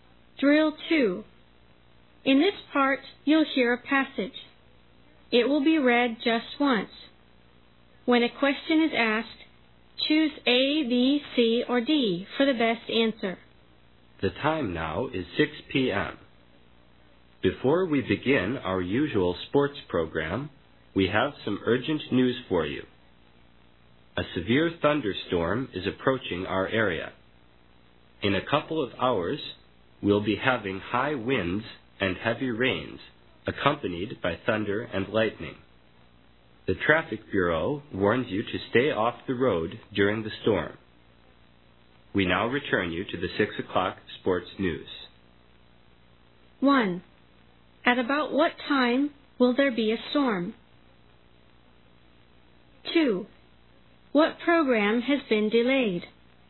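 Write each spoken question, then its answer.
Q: At about what time will there be a storm?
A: About 8 p.m.

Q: What program has been delayed?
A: The sports program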